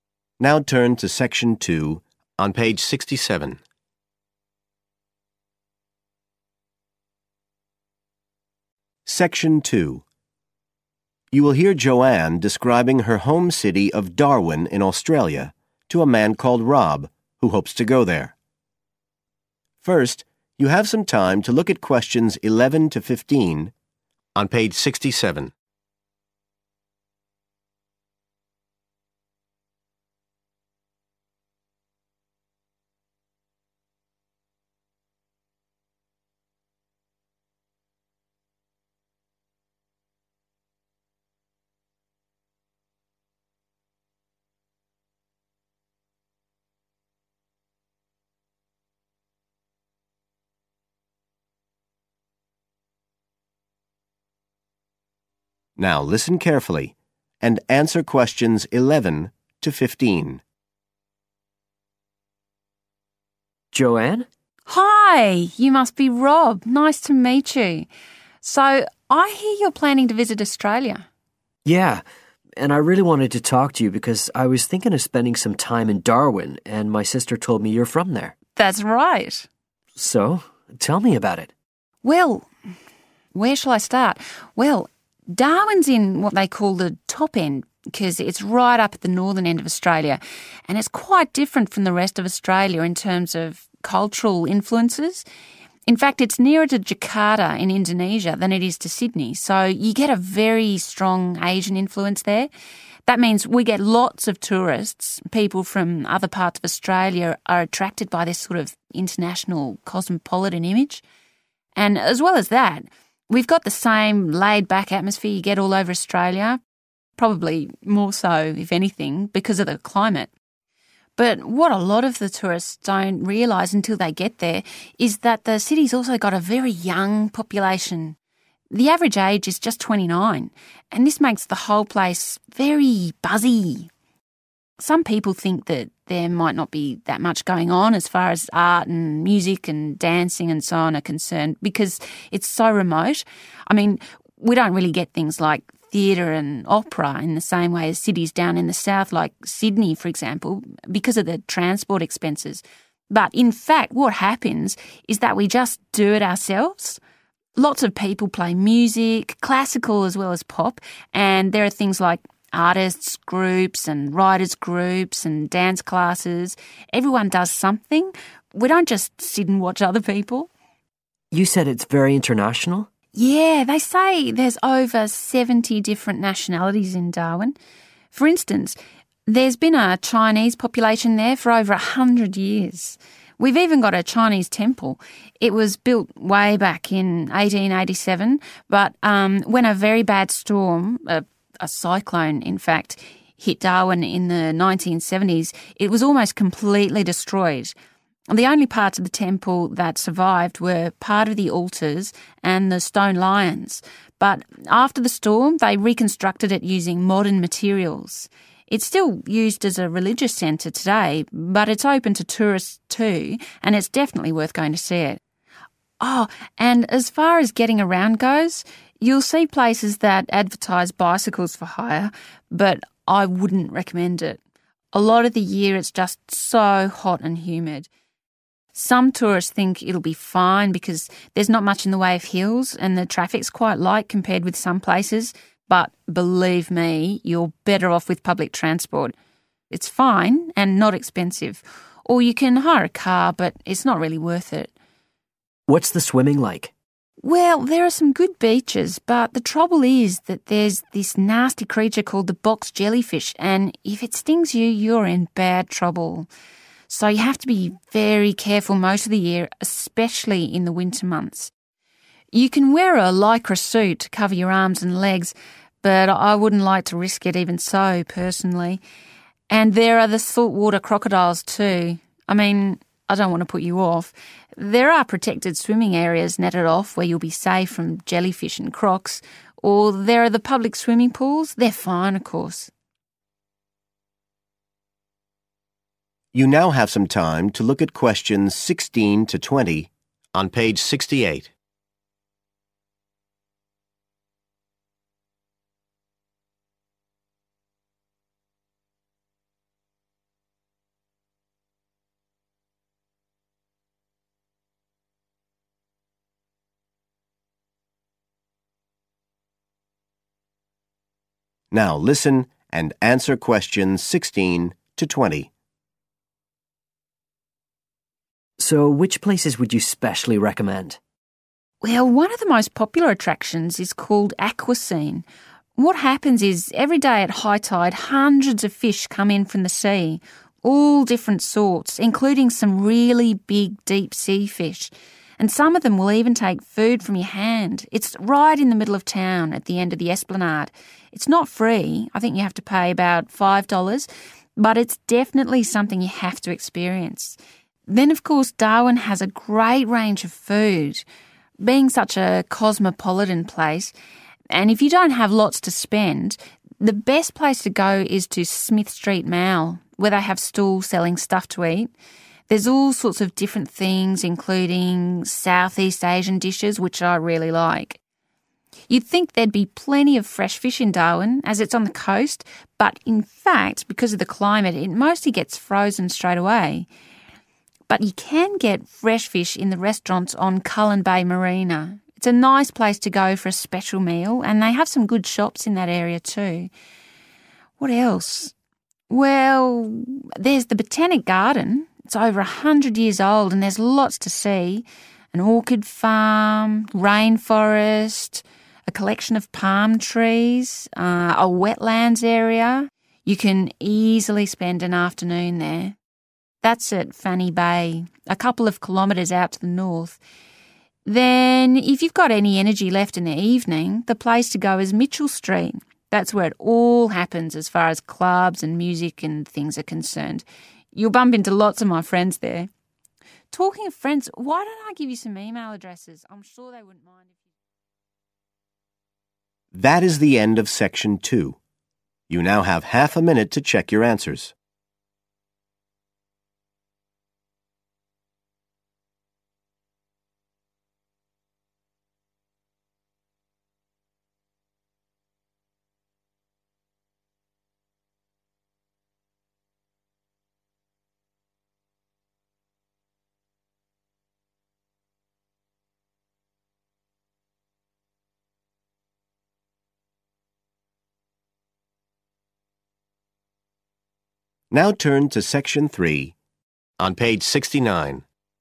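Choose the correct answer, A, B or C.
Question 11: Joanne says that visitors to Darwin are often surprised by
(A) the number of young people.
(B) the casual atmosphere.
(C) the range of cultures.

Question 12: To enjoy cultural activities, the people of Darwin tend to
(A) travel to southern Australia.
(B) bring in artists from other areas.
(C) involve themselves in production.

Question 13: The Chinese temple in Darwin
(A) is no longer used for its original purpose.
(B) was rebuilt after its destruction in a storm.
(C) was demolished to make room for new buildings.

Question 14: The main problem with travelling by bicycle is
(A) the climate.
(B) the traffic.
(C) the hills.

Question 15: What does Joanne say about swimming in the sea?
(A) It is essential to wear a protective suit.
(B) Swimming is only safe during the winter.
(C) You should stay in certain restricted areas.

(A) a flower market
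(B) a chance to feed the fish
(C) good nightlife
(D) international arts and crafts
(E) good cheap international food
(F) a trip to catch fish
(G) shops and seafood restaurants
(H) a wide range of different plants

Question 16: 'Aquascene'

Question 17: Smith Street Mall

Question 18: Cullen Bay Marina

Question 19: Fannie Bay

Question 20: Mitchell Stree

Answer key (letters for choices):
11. A
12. C
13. B
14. A
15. C
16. B
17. E
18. G
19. H
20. C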